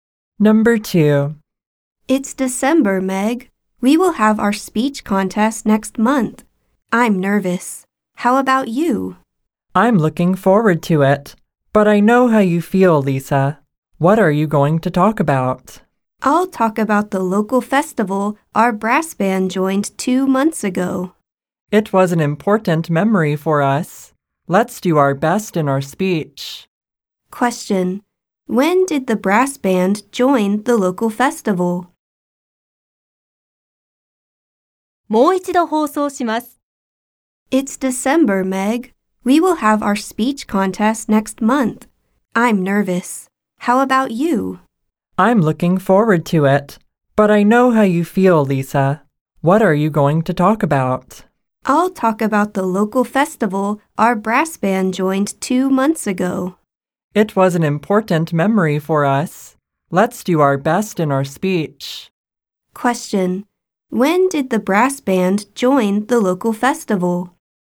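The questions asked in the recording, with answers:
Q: When did the brass band join the local festival?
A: In October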